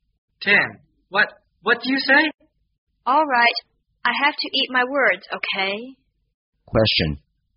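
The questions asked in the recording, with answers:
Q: What does eat my words mean?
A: To admit that what I said was wrong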